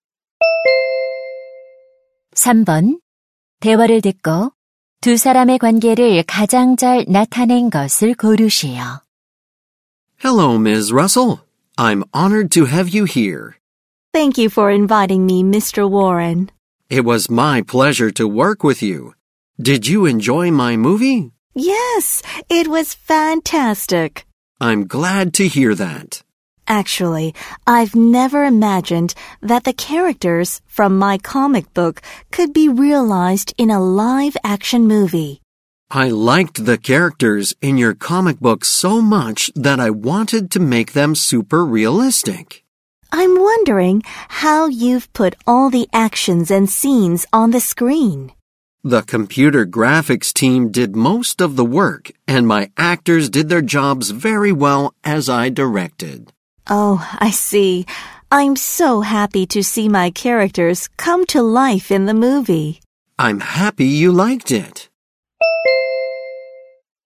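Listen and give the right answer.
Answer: 만화 작가 - 영화 감독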